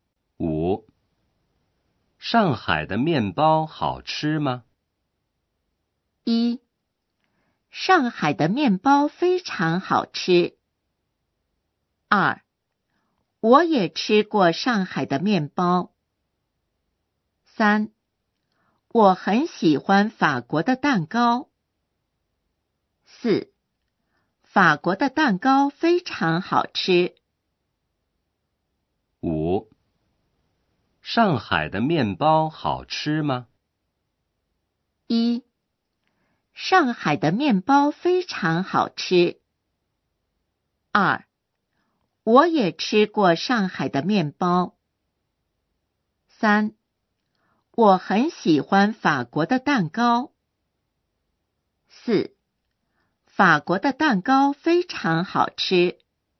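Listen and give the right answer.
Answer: 1: 上海的面包非常好吃。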